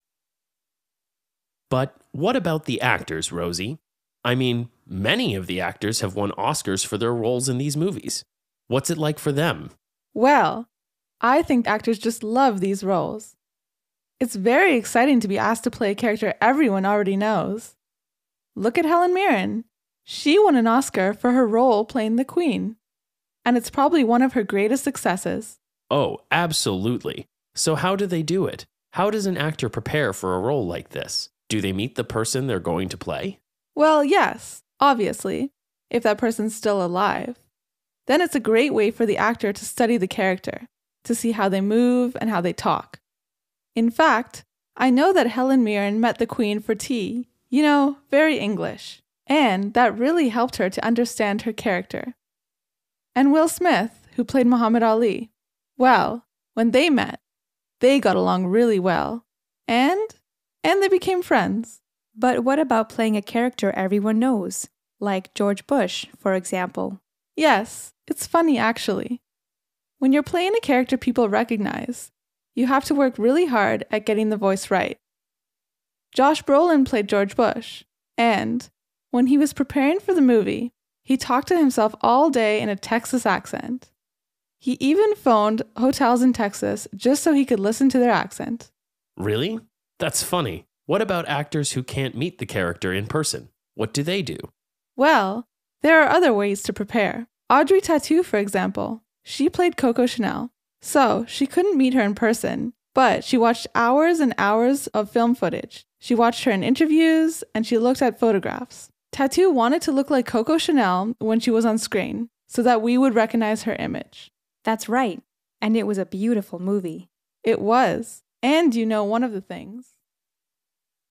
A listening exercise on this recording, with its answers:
B. Listen to the second part of the radio program. Are the sentences true (T) or false (F)?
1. Helen Mirren won an Oscar for her role as the Queen.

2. Will Smith met Muhammad Ali, but they didn't get along.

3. Josh Brolin talked to himself in a Texas accent all day.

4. Audrey Tautou watched movies of Coco Chanel.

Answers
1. T
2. F
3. T
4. T

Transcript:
H2: But, what about the actors, Rosie? I mean, many of the actors have won Oscars for their roles in these movies. What's it like for them?
R: Well, I think actors just love these roles. It's very exciting to be asked to play a character everyone already knows. Look at Helen Mirren. She won an Oscar for her role playing the Queen, and it's probably one of her greatest successes.
H1: Oh, absolutely! So, how do they do it? How does an actor prepare for a role like this? Do they meet the person they're going to play?
R: Well, yes, obviously, if that person is still alive, then that's a great way for the actor to study the character, to see how they move and how they talk. In fact, I know that Helen Mirren met the Queen for tea, you know, very English. And that really helped her to understand her character. And Will Smith, who played Muhammad Ali ... Well, when they met, they got along really well, and ...
What do they do?
and they became friends.
H2: But what about playing a character everyone knows, like George Bush, for example?
R: Yes, it's funny actually, when you're playing a character people recognize, you have to work really hard at getting the voice right. Josh Brolin played George Bush. And, when he was preparing for the movie, he talked to himself all day in a Texas accent. He even phoned hotels in Texas, just so he could listen the accent.
H1: Really? That's funny. What about actors who can't meet the character in person?
R: Well, there are other ways to prepare. Audrey Tautou, for example. She played Coco Chanel. So, she couldn't meet her in person, but she watched hours and hours of film footage. She watched her in interviews, and she looked at photographs. Tautou wanted to look like Coco Chanel when she was on screen so that we would recognize her image.
H2: That's right. And it was a beautiful movie.
R: It was, and you know one of the things ...